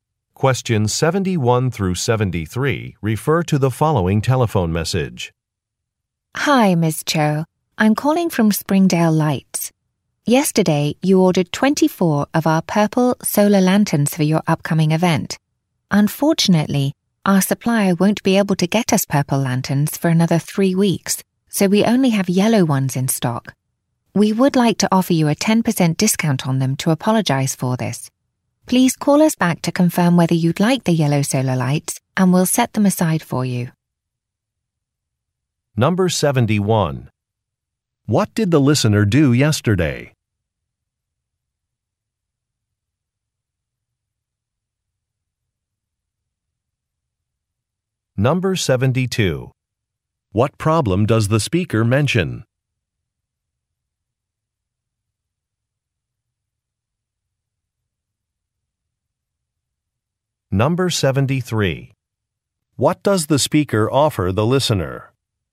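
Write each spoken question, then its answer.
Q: What did the listener do yesterday?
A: She ordered 24 purple solar lanterns.

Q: What problem does the speaker mention?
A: The purple lanterns are out of stock for 3 weeks.

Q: What does the speaker offer the listener?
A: A 10% discount on yellow lanterns.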